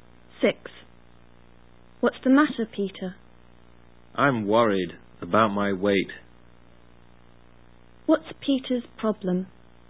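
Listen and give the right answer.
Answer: He is worried about his weight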